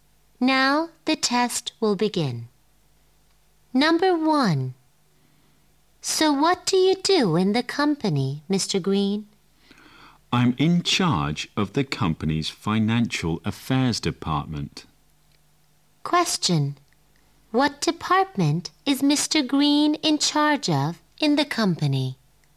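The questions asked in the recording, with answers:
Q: What department is Mr. Green in charge of in the company?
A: The financial affairs department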